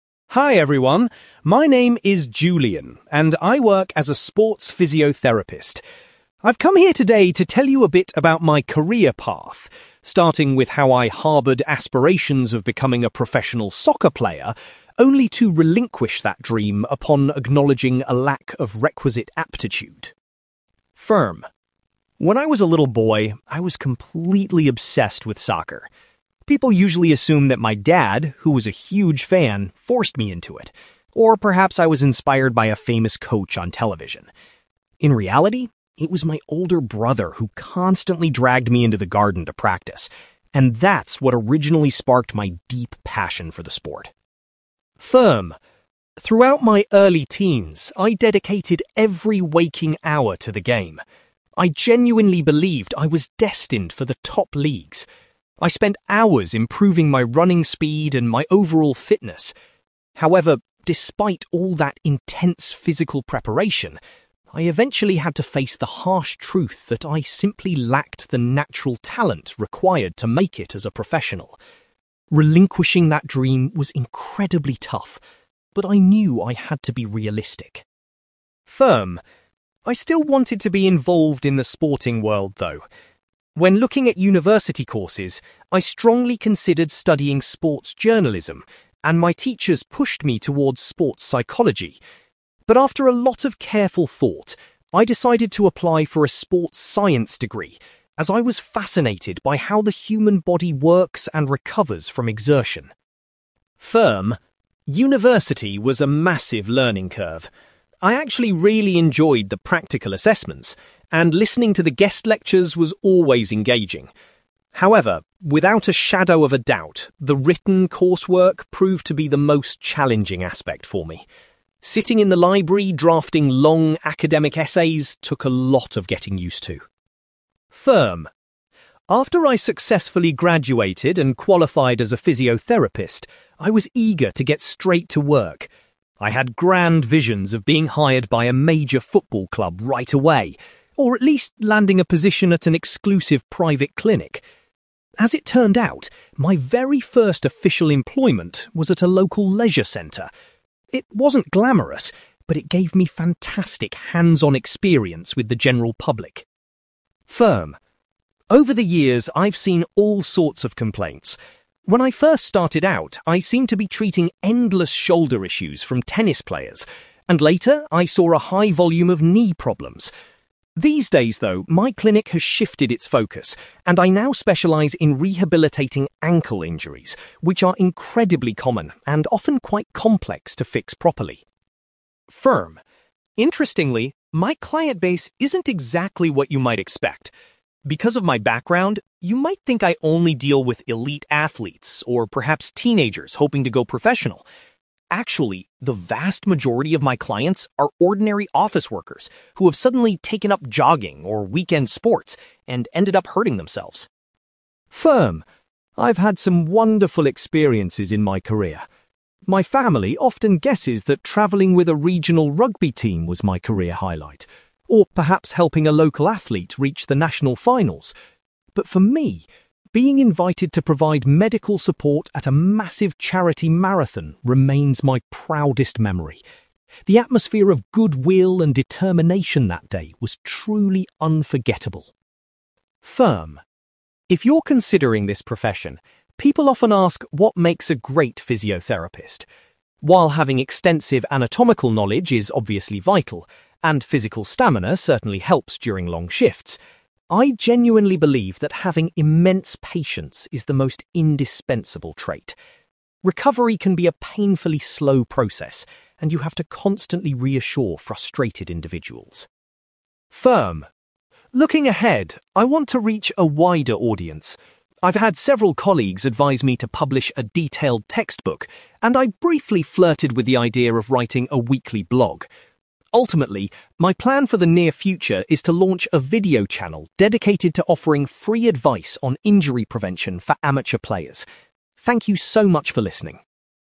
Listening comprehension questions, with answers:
You will hear a man called Julian giving a presentation about his career as a sports physiotherapist. For questions 9-18, complete the sentences with a word or short phrase.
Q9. Julian says that his (9)........................... was the person who first motivated him to play soccer.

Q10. Julian gave up his ambition when he realised he did not have the (10)........................... to become a professional.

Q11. Instead of other sports-related subjects, Julian chose to complete a degree in (11)........................... .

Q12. Julian states that the (12)........................... was the hardest part of his time at university.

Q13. Julian's initial job after getting his qualifications was based in a (13)........................... .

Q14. In his current daily practice, Julian primarily concentrates on dealing with (14)........................... .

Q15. Julian was surprised to find that (15)........................... make up the largest group of his patients.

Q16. Julian regards working at a (16)........................... as his most rewarding professional experience.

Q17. Julian claims that a high level of (17)........................... is the most important characteristic for a physiotherapist to possess.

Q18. Julian intends to start a (18)........................... to help amateur athletes avoid getting hurt.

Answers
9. older brother
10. natural talent
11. sports science
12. written coursework
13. leisure centre
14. ankle injuries
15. office workers
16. charity marathon
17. patience
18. video channel

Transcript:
Julian: Hi everyone, my name is Julian, and I work as a sports physiotherapist. I've come here today to tell you a bit about my career path, starting with how I harboured aspirations of becoming a professional soccer player, only to relinquish that dream upon acknowledging a lack of requisite aptitude.
When I was a little boy, I was completely obsessed with soccer. People usually assume that my dad, who was a huge fan, forced me into it, or perhaps I was inspired by a famous coach on television. In reality, it was my older brother who constantly dragged me into the garden to practice, and that's what originally sparked my deep passion for the sport.
Throughout my early teens, I dedicated every waking hour to the game. I genuinely believed I was destined for the top leagues. I spent hours improving my running speed and my overall fitness. However, despite all that intense physical preparation, I eventually had to face the harsh truth that I simply lacked the natural talent required to make it as a professional. Relinquishing that dream was incredibly tough, but I knew I had to be realistic.
I still wanted to be involved in the sporting world, though. When looking at university courses, I strongly considered studying sports journalism, and my teachers pushed me towards sports psychology. But after a lot of careful thought, I decided to apply for a sports science degree, as I was fascinated by how the human body works and recovers from exertion.
University was a massive learning curve. I actually really enjoyed the practical assessments, and listening to the guest lectures was always engaging. However, without a shadow of a doubt, the written coursework proved to be the most challenging aspect for me. Sitting in the library drafting long academic essays took a lot of getting used to.
After I successfully graduated and qualified as a physiotherapist, I was eager to get straight to work. I had grand visions of being hired by a major football club right away, or at least landing a position at an exclusive private clinic. As it turned out, my very first official employment was at a local leisure centre. It wasn't glamorous, but it gave me fantastic hands-on experience with the general public.
Over the years, I've seen all sorts of complaints. When I first started out, I seemed to be treating endless shoulder issues from tennis players, and later I saw a high volume of knee problems. These days, though, my clinic has shifted its focus, and I now specialise in rehabilitating ankle injuries, which are incredibly common and often quite complex to fix properly.
Interestingly, my client base isn't exactly what you might expect. Because of my background, you might think I only deal with elite athletes, or perhaps teenagers hoping to go professional. Actually, the vast majority of my clients are ordinary office workers who have suddenly taken up jogging or weekend sports and ended up hurting themselves.
I've had some wonderful experiences in my career. My family often guesses that travelling with a regional rugby team was my career highlight, or perhaps helping a local athlete reach the national finals. But for me, being invited to provide medical support at a massive charity marathon remains my proudest memory. The atmosphere of goodwill and determination that day was truly unforgettable.
If you're considering this profession, people often ask what makes a great physiotherapist. While having extensive anatomical knowledge is obviously vital, and physical stamina certainly helps during long shifts, I genuinely believe that having immense patience is the most indispensable trait. Recovery can be a painfully slow process, and you have to constantly reassure frustrated individuals.
Looking ahead, I want to reach a wider audience. I've had several colleagues advise me to publish a detailed textbook, and I briefly flirted with the idea of writing a weekly blog. Ultimately, my plan for the near future is to launch a video channel dedicated to offering free advice on injury prevention for amateur players. Thank you so much for listening!

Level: B2